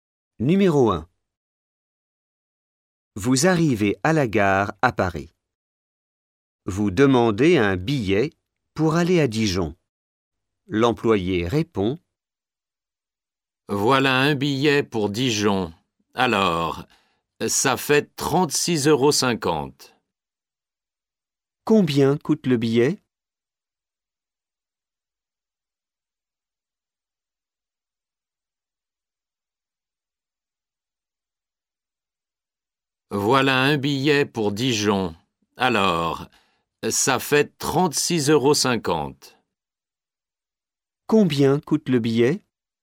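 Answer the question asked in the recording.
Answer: 36,50 €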